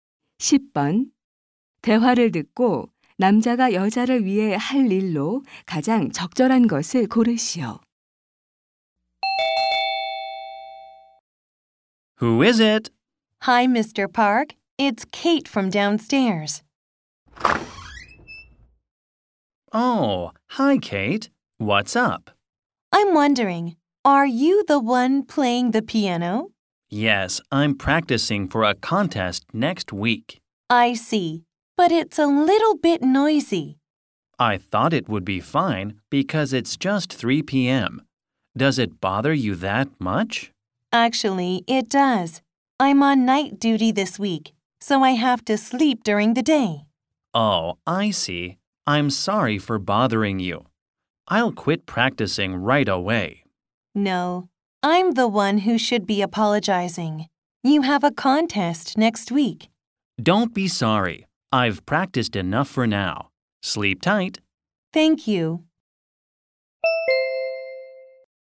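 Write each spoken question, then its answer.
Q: 대화를 듣고 남자가 여자를 위해 할 일로 가장 적절한 것을 고르시오.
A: 피아노 연습을 그만두기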